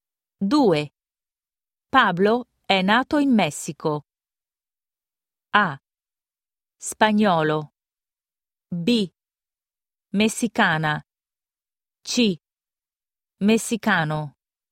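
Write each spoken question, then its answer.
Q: Pablo è nato in Messico.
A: C: Messicano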